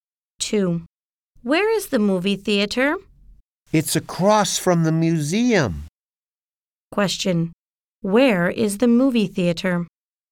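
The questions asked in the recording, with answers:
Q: Question. Where is the movie theater?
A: Across from the museum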